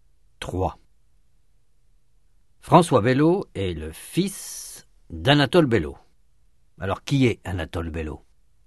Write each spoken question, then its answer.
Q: Alors, qui est Anatole Bello?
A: Le père de François.